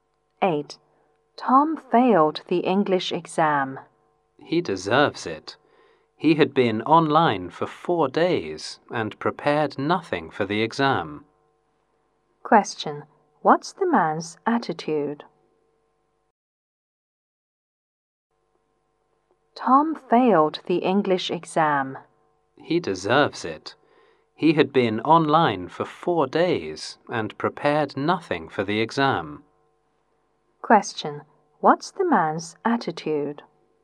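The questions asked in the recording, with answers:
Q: What's the man's attitude?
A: He thinks Tom deserved to fail.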